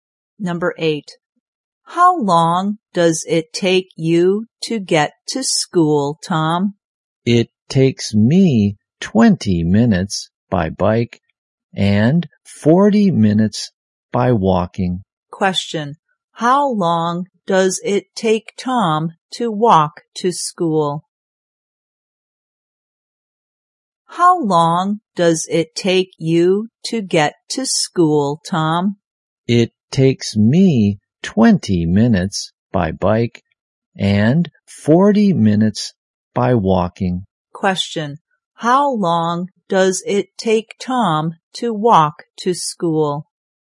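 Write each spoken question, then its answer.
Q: How long does it take Tom to walk to school?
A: 40 minutes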